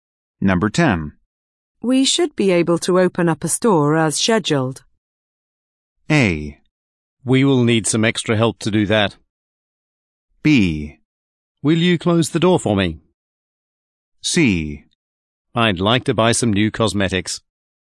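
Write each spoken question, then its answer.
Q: We should be able to open up a store as scheduled.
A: A: We will need some extra help to do that.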